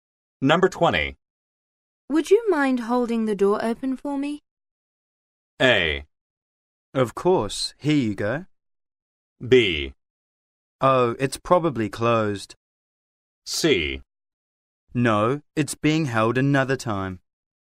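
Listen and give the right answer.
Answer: A: Of course. Here you go.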